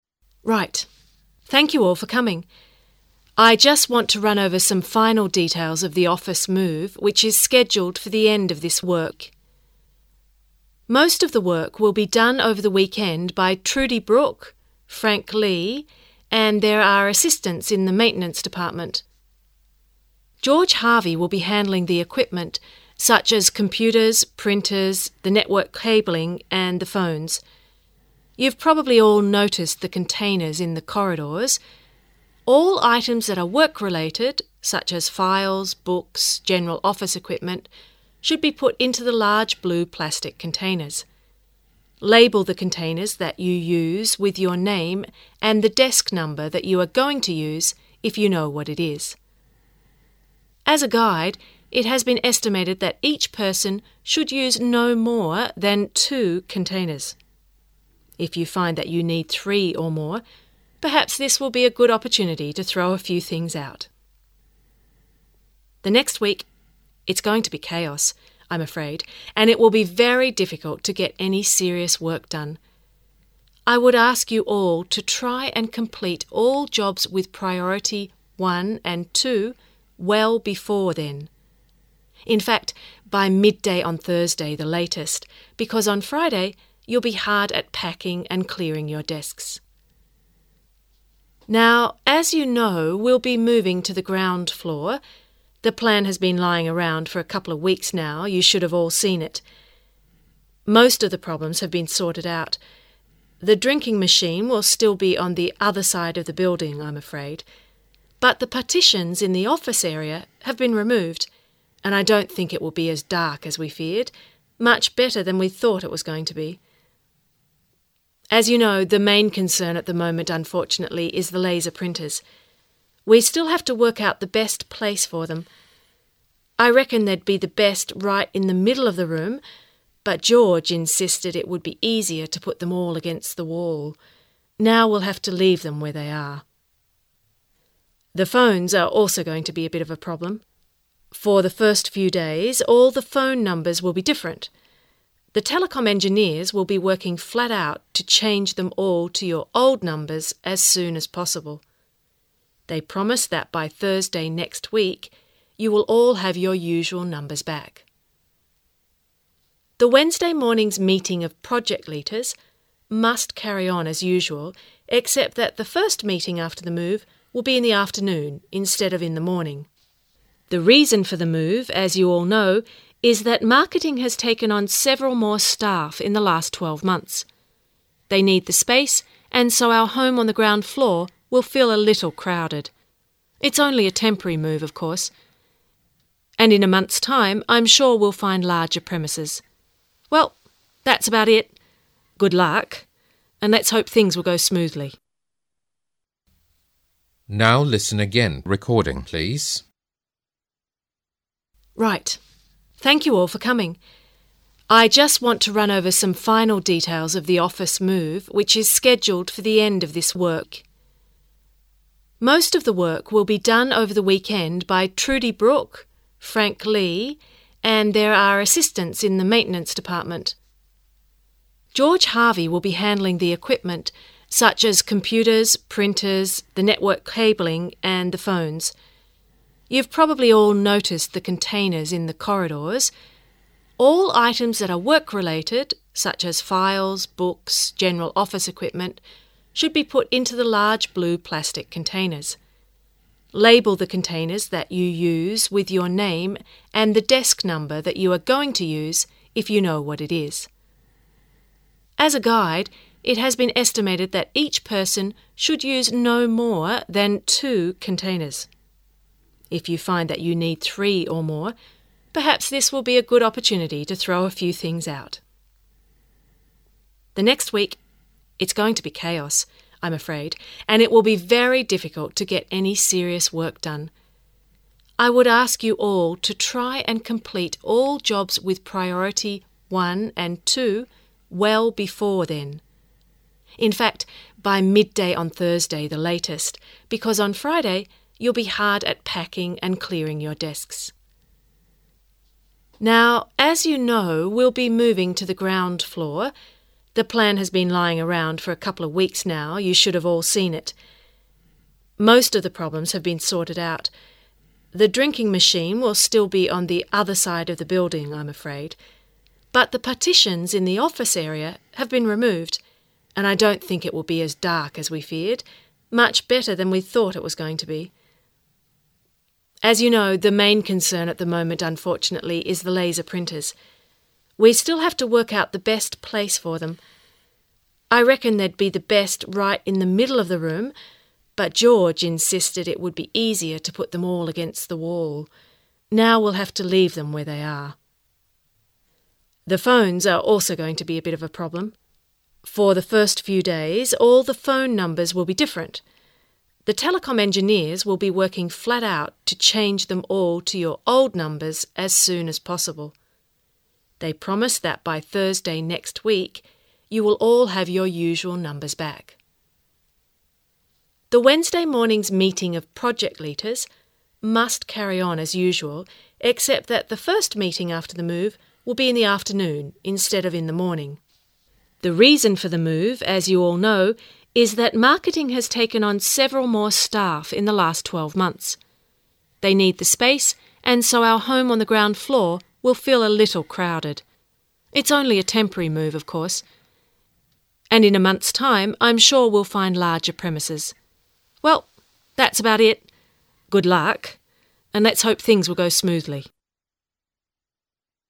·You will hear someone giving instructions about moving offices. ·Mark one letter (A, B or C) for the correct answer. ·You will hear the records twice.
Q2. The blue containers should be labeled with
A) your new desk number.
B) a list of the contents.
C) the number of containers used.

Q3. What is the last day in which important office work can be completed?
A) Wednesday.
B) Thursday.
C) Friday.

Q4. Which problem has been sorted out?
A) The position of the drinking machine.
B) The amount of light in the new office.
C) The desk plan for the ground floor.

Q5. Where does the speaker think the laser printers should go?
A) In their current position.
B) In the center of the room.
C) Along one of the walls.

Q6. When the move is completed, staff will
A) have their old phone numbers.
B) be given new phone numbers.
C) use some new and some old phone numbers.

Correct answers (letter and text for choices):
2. A) your new desk number.
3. B) Thursday.
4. B) The amount of light in the new office.
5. B) In the center of the room.
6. A) have their old phone numbers.

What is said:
[解析] 23-30 F: Right, thank you all for coming. I just want to run over some final details of the office move which is scheduled for the end of this work. Most of the work will be done over the weekend by Trudi Brook, Frank Lee and there are assistants in the Maintaince Department. George Harvey will be handling the equipment, such as computers, printers, the network cabling and the phones. You've probably all noticed the containers in the corridors -- all items that are work-related such as files, books, general office equipment should be put into the large blue plastic containers. Label the containers that you use with your name and the desk number that you are going to use if you know what it is. As a guide, it has been estimated that each person should use no more than two containers. If you find that you need three or more, perhaps this will be a good opportunity to throw a few things out. The next week, it's going to be chaos, I'm afraid and it will be very difficult to get any serious work done. I would ask you all to try and complete all jobs with priority one and two well before then. In fact, by midday on Thursday the latest, because on Friday you'll be hard at packing and clearing your desks. Now, as you know we'll be moving to the ground floor, the plan has been lying around for a couple of weeks now you should all have seen it. Most of the problems have been sorted out. The drinking machine will still be on the other side of the building, I'm afraid. But the partitions in the office area have been removed. And I don't think it will be as dark as we feared, much better than we thought it was going to be. As you know, the main concern at the moment unfortunately is the laser printers. We still have to work out the best place for them. I reckon they'd be the best right in the middle of the room, but George insisted it would be easier to put them all against the wall. Now we'll have to leave them where they are. The phones are also going to be a bit of problem. For the first few days, all the phone numbers will be different. The Telecom engineers will be working flat out to change them all to your old numbers as soon as possible. They promise that by Thursday next week you will all have your usual numbers back. The Wednesday morning's meeting of project leaders must carry on as usual except that the first meeting after the move will be in the afternoon instead of in the morning. The reason for the move, as you all know, is that marketing has taken on several more staff in the last twelve months. They need the space and so our home on the ground floor will feel a little crowded. It's only a temporary move of course. And in months' time, I'm sure we'll find larger premises. Well, that's about it. Good luck. And let's hope things will go smoothly.